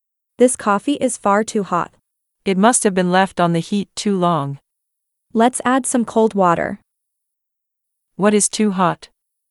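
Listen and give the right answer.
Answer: The coffee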